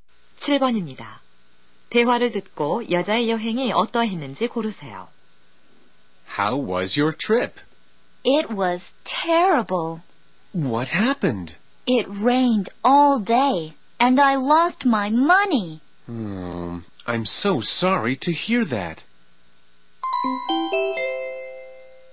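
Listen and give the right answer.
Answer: 끔찍했다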